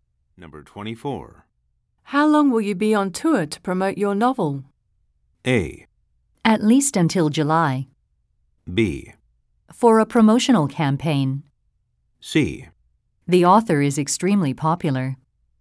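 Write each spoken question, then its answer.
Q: How long will you be on tour to promote your novel?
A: A: At least until July.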